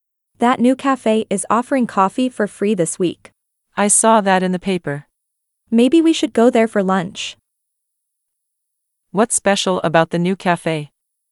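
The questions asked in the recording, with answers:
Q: What's special about the new cafe?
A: It's offering free coffee this week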